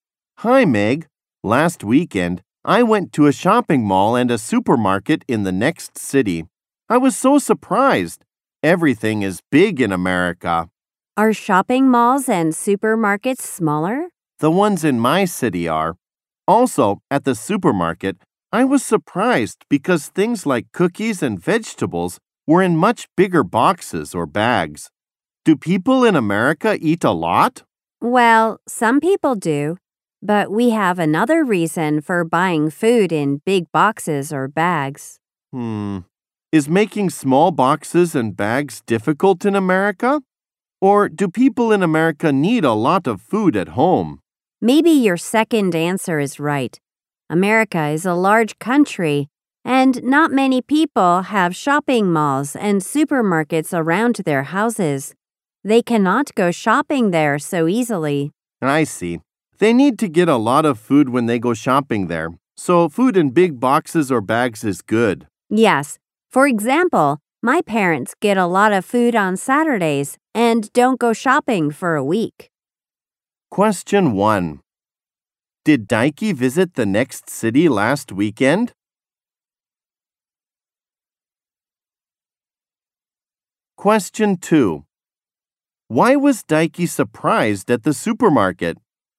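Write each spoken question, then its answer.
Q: Did Daiki visit the next city last weekend?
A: Yes, he did.

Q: Why was Daiki surprised at the supermarket?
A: Because things like cookies and vegetables were in much bigger boxes or bags.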